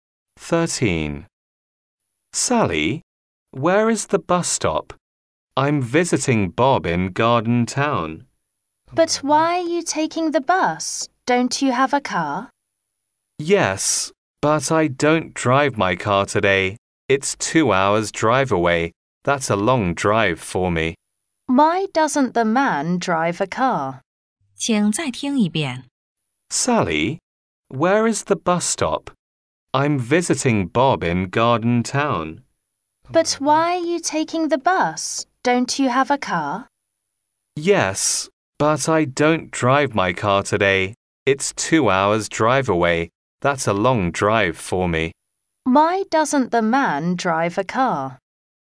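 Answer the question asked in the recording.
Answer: It's a two-hour drive, too long for him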